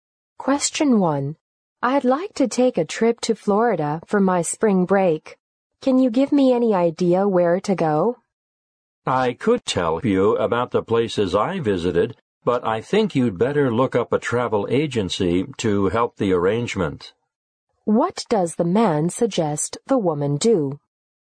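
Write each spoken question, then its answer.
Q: What does the man suggest the woman do?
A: Ask a travel agency to help with the arrangements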